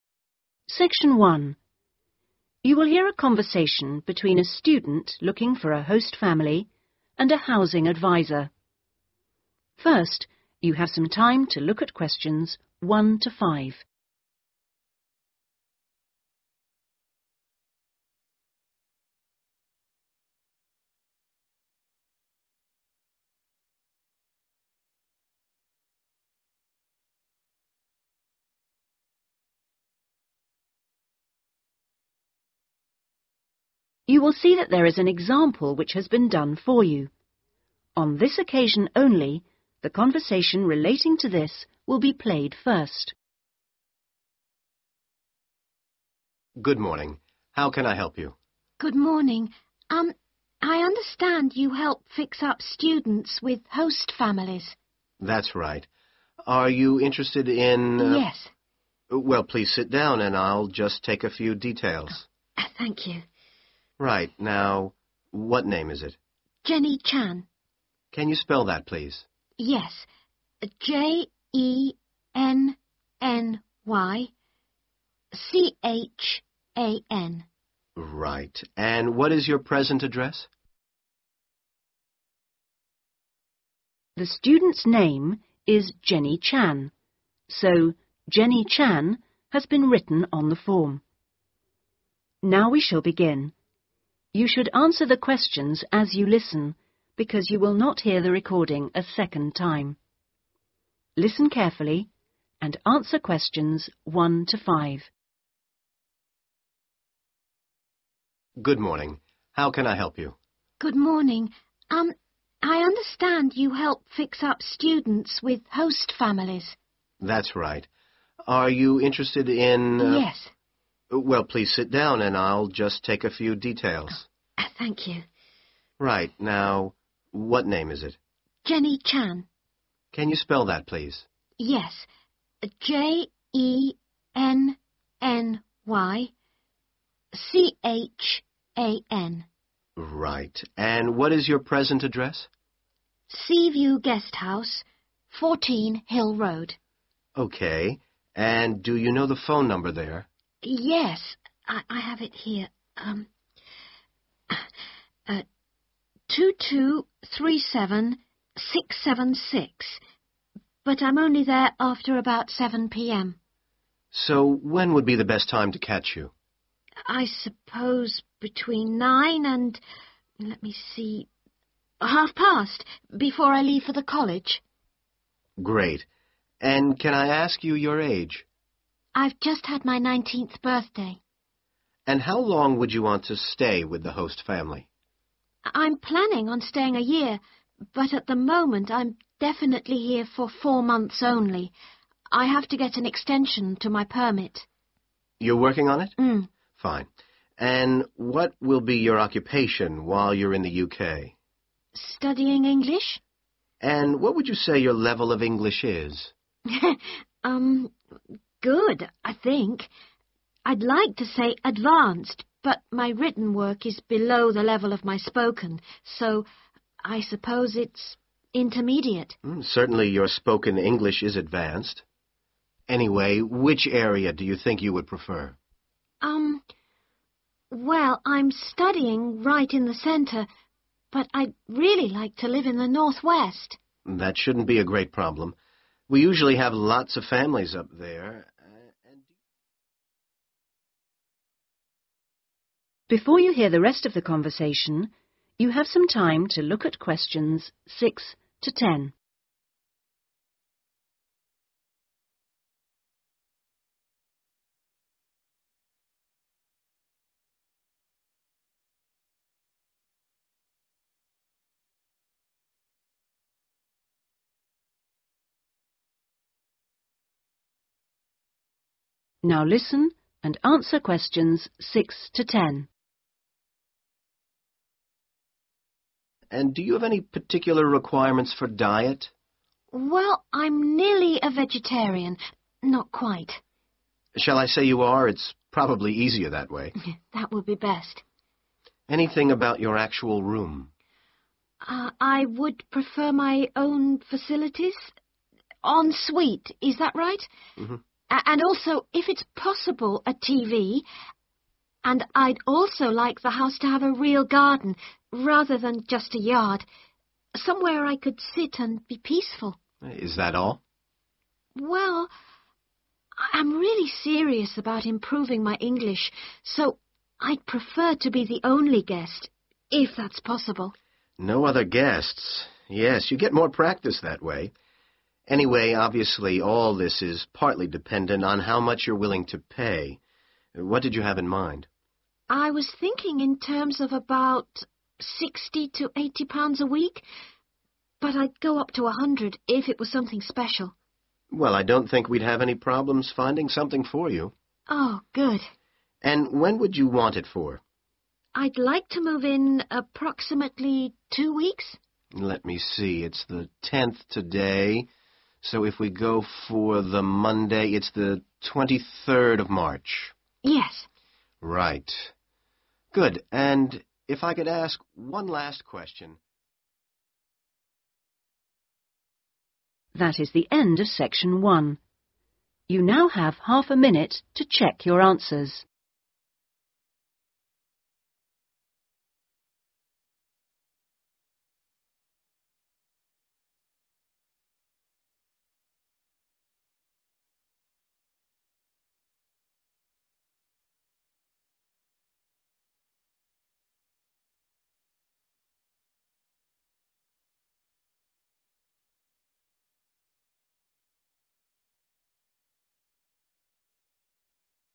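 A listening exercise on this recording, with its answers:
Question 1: Present Address: Sea View Guesthouse 1. .............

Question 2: [N.B. best time to contact is 2. ............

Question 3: Intended length of stay: 3..............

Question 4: General Level of English: 4.................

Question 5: Preferred location: In the 5...................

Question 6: Special diet: 6...............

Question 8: - to be 8.............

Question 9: Maximum price to be 9. £........... per week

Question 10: Preferred starting date: 10...............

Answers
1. 14 Hill Road
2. between 9 and 1:30
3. 4 months
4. intermediate
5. northwest
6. vegetarian
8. the only guest
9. 100
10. 23rd March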